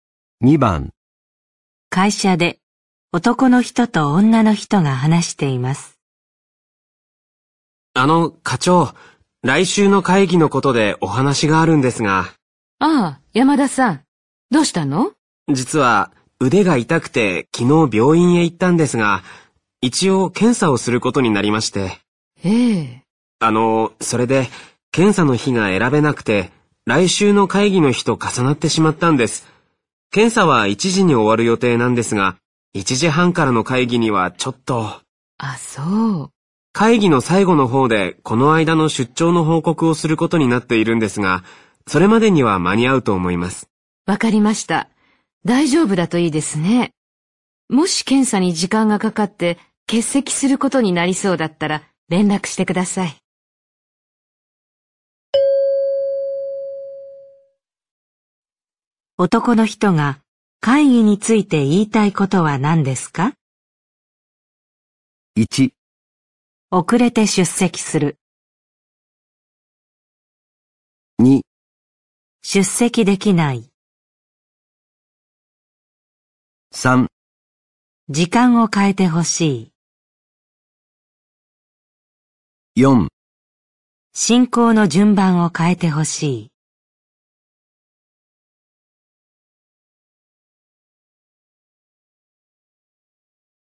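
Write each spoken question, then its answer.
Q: 男の人が会議について言いたいことは何ですか?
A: 1: 遅れて出席する。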